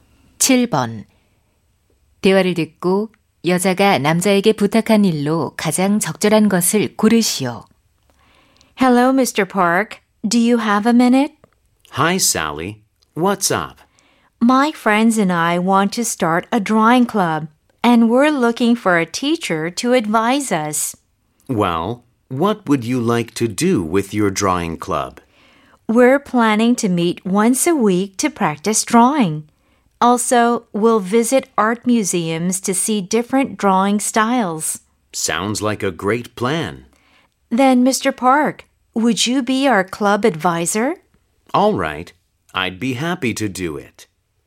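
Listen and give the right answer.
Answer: 미술 동아리 지도교사 되어 주기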